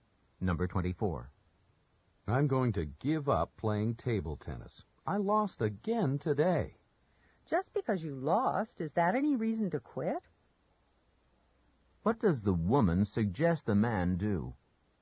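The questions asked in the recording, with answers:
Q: What does the woman suggest the man do?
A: Keep playing table tennis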